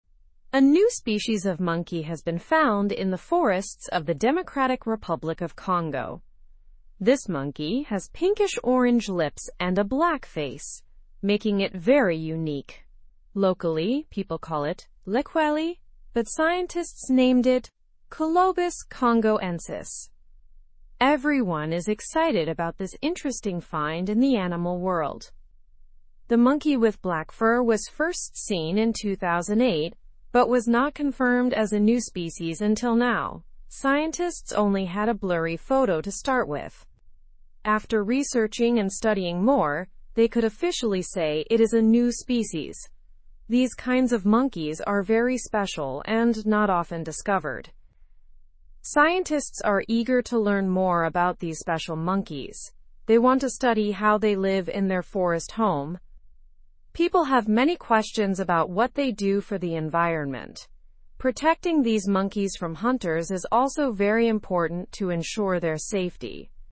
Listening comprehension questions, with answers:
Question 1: Where was the new monkey species discovered?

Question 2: What is a distinctive feature of the new monkey?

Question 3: What name did the local people give the monkey?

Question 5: Why is the discovery of the new species exciting?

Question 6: What do scientists want to learn about the monkeys?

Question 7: Why is protecting the monkeys important?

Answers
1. It was discovered in the Democratic Republic of Congo.
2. It has pinkish-orange lips and a black face.
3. Locally, it is called 'Likweli'.
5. It is exciting because it's a unique new species.
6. Scientists want to learn about their behavior and how they live.
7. It is important to protect them from hunting.

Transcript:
A new species of monkey has been found in the forests of the Democratic Republic of Congo. This monkey has pinkish-orange lips and a black face, making it very unique. Locally, people call it 'Likweli', but scientists named it 'Colobus congoensis'. Everyone is excited about this interesting find in the animal world.
The monkey with black fur was first seen in 2008 but was not confirmed as a new species until now. Scientists only had a blurry photo to start with. After researching and studying more, they could officially say it is a new species. These kinds of monkeys are very special and not often discovered.
Scientists are eager to learn more about these special monkeys. They want to study how they live in their forest home. People have many questions about what they do for the environment. Protecting these monkeys from hunters is also very important to ensure their safety.

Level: Level 2